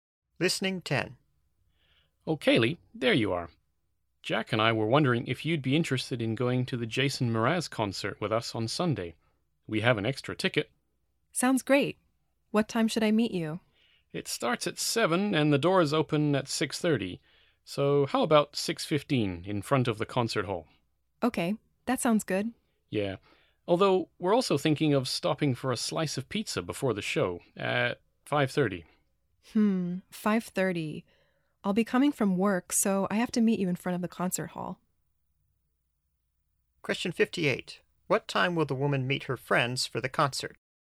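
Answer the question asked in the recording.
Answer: 6:15, in front of the concert hall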